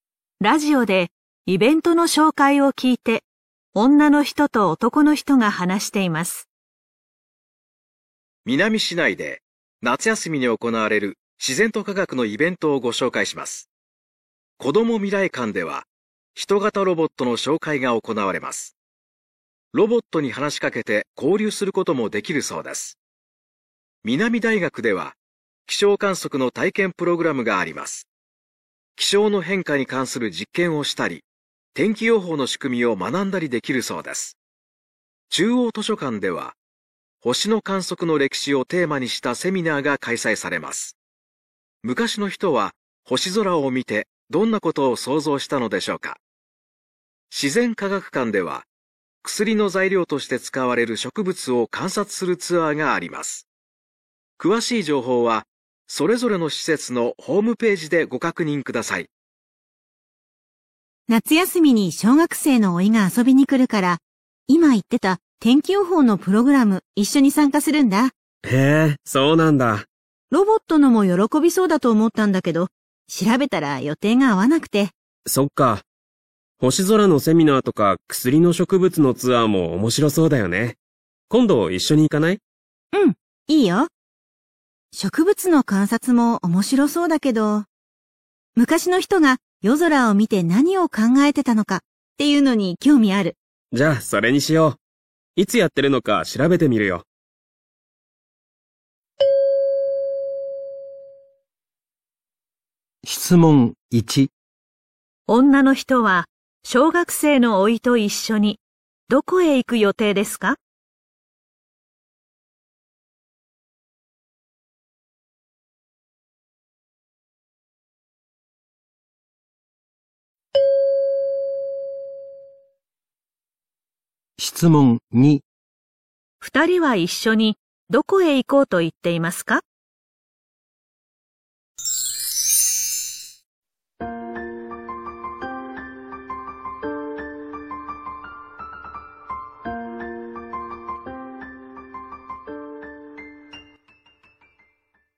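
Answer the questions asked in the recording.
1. 南大学(気象観測の体験プログラム)
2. 中央図書館(星の観測の歴史のセミナー)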